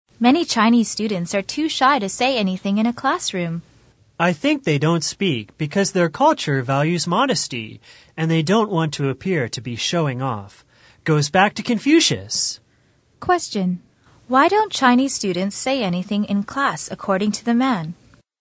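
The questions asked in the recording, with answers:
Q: Why don't Chinese students say anything in class according to the man?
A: Their culture values modesty; they don't want to appear to be showing off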